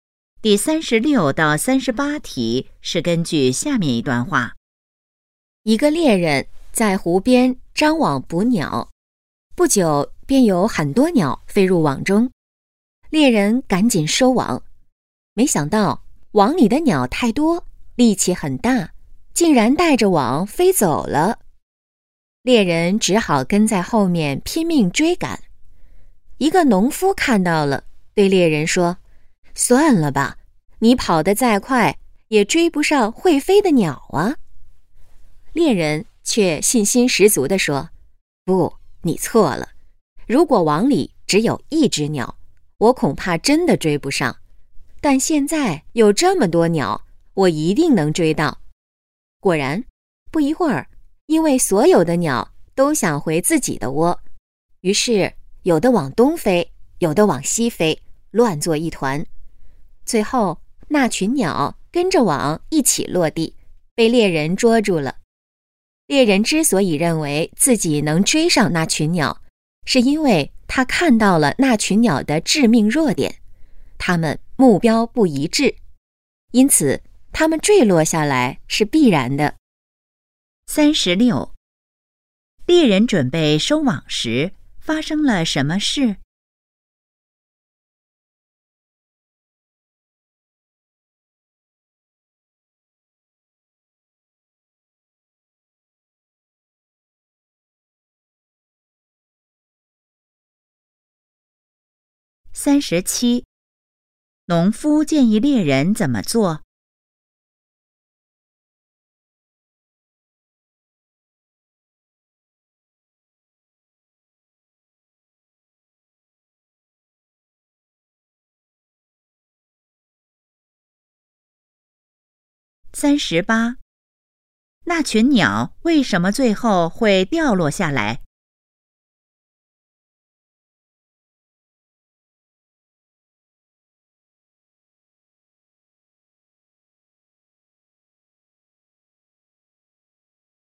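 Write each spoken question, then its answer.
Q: 猎人准备收网时,发生了什么事?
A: 鸟带着网飞走了

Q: 农夫建议猎人怎么做?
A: 别追了

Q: 那群鸟为什么最后会掉落下来?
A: 目标不一致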